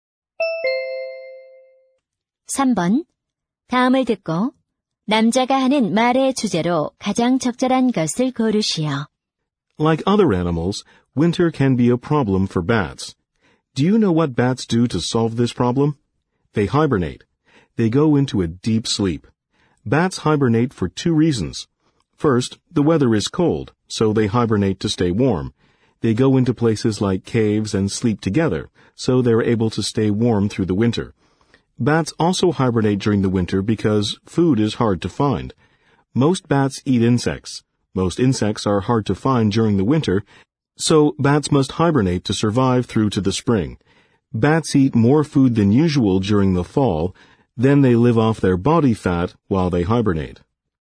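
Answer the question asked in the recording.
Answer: 박쥐가 겨울잠을 자는 이유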